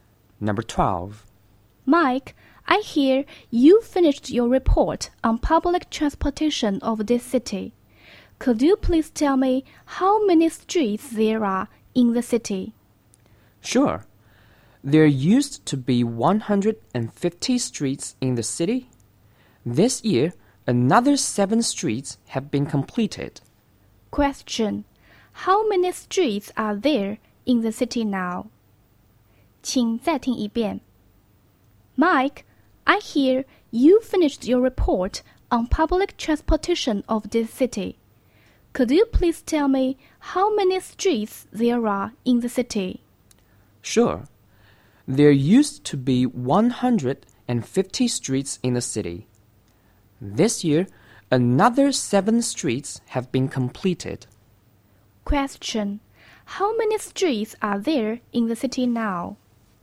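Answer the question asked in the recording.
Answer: 157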